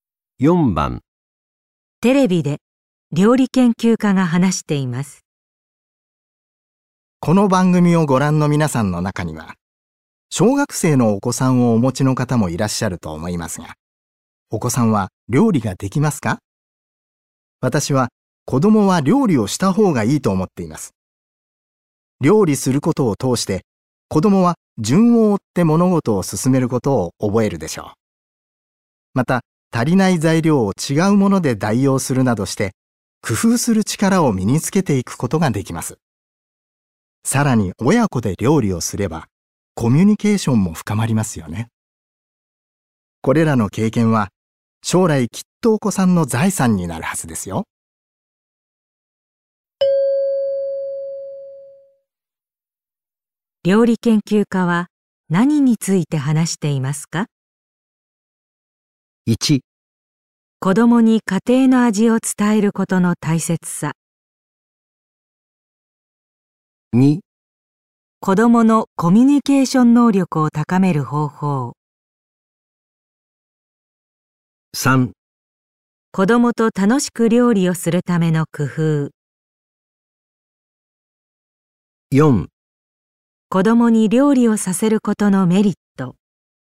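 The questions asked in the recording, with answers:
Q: 料理研究家は何について話していますか?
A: 4: 子供に料理をさせることのメリット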